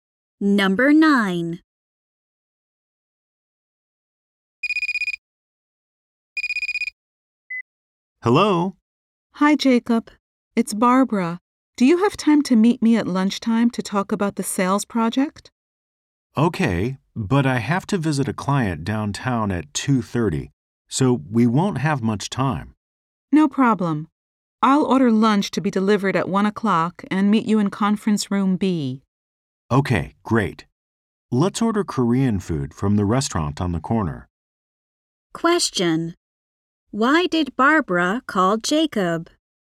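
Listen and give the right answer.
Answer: To meet at lunchtime to talk about the sales project.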